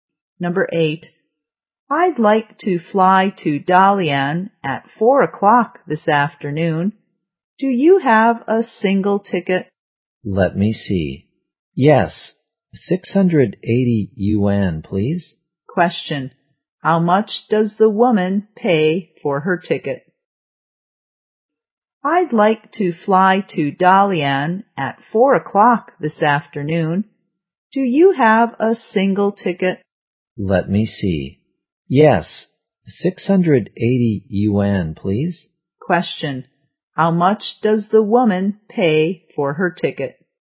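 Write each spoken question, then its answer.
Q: Question, how much does the woman pay for her ticket?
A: 680 yuan.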